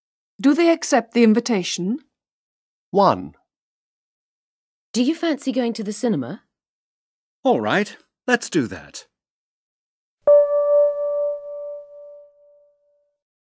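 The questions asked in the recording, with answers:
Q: Do they accept the invitation?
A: Yes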